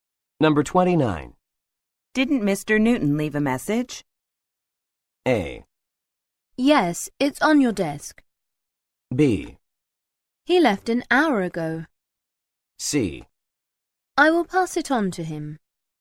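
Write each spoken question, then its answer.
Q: Didn't Mr. Newton leave a message?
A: A: Yes, it's on your desk.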